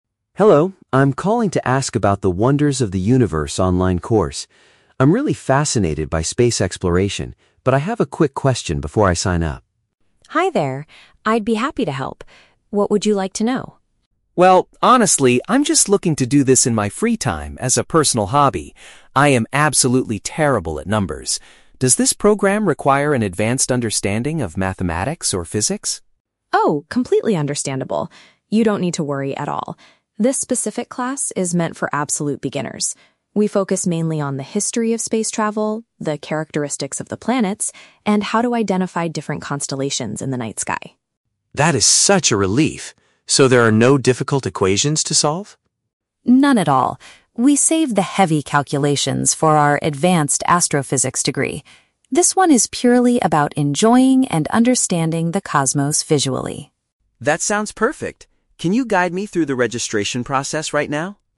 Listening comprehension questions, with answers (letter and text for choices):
Listen to the conversation between a learner and an educational advisor. For each question, choose the correct answer (A, B, or C).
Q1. Why is Alex hesitant to register for the course at first?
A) He lacks confidence in his calculation abilities.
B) He is worried the class will take up all his free time.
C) He thinks the online tuition fee is much too expensive.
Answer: A) He lacks confidence in his calculation abilities.

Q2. What will the students mainly learn in this specific program?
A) How to solve difficult physics and math equations.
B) General knowledge about the solar system and stars.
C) How to build and operate a professional telescope.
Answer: B) General knowledge about the solar system and stars.

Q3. What is Alex's main motivation for taking this class?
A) To eventually earn an advanced astrophysics degree.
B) To prepare for a future career in the space industry.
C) To pursue a personal leisure interest for fun.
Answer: C) To pursue a personal leisure interest for fun.

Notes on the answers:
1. Alex states that he is "absolutely terrible at numbers," which is paraphrased as "lacking confidence in his calculation abilities." Option B is a trap because the audio mentions "free time," but Alex says he wants to do this in his free time, not that he is worried it will take too much of it. Option C is a plausible concern for a student, but money is never mentioned.
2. Sarah explains that the course focuses on the "characteristics of the planets" (the solar system) and identifying "constellations" (stars). Option A is the trap; Sarah explicitly states that "difficult equations" and "heavy calculations" are saved for the advanced degree, not this course. Option C is plausible for an astronomy class but is not mentioned in the audio.
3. Alex explicitly says, "I'm just looking to do this in my free time as a personal hobby." "Personal hobby" is paraphrased as "a personal leisure interest for fun." Option A is a trap; the "advanced astrophysics degree" is mentioned by the advisor, but it is not what Alex is aiming for. Option B is plausible but contradicts his statement that he is doing it as a hobby.

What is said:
Alex: Hello, I'm calling to ask about the "Wonders of the Universe" online course. I'm really fascinated by space exploration, but I have a quick question before I sign up.
Sarah: Hi there! I'd be happy to help. What would you like to know?
Alex: Well, honestly, I'm just looking to do this in my free time as a personal hobby. I am absolutely terrible at numbers. Does this program require an advanced understanding of mathematics or physics?
Sarah: Oh, completely understandable! You don't need to worry at all. This specific class is meant for absolute beginners. We focus mainly on the history of space travel, the characteristics of the planets, and how to identify different constellations in the night sky.
Alex: That is such a relief. So there are no difficult equations to solve?
Sarah: None at all. We save the heavy calculations for our advanced astrophysics degree. This one is purely about enjoying and understanding the cosmos visually.